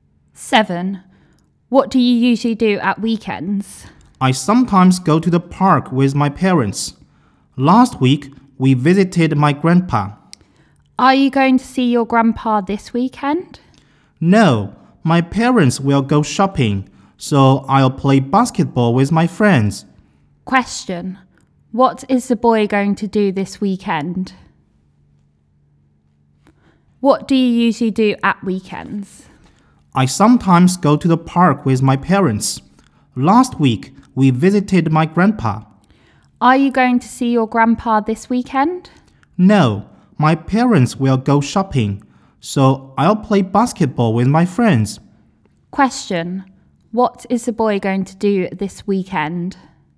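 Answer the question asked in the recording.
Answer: Play basketball with his friends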